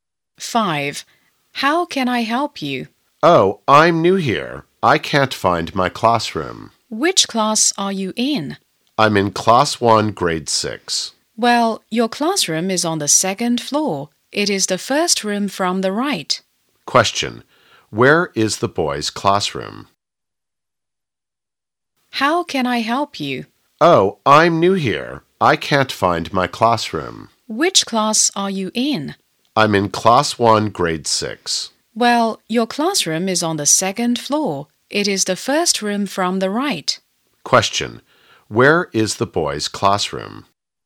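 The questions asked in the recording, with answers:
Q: Question. Where is the boys' classroom?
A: On the second floor, the first room from the right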